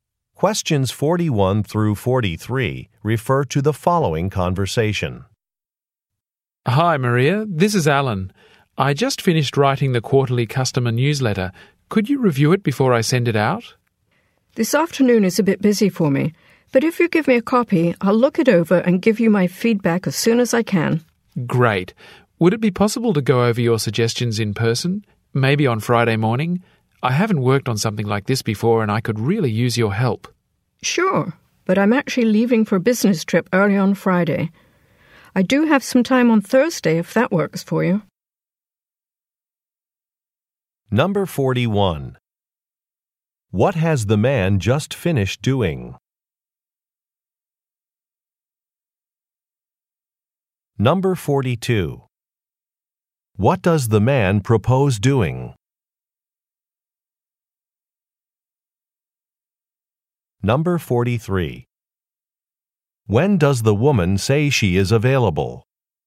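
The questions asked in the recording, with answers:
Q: What has the man just finished doing?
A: Writing the quarterly customer newsletter

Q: What does the man propose doing?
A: Going over her suggestions in person, maybe on Friday morning

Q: When does the woman say she is available?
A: On Thursday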